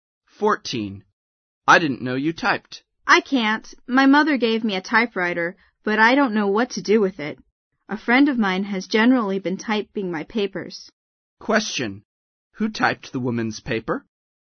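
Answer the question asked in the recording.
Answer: A friend of hers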